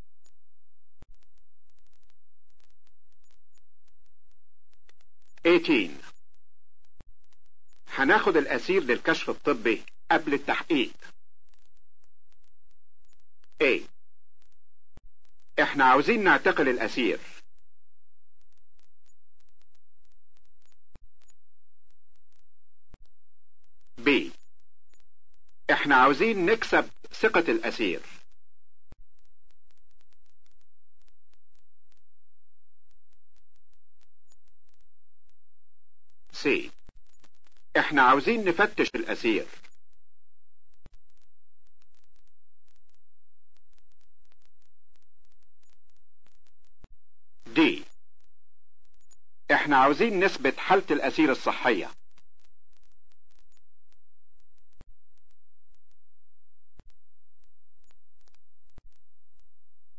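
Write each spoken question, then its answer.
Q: هناخد الاسير للكشف الطبي قبل التحقيق.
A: D: احنا عاوزين نثبت حالة الاسير الصحية.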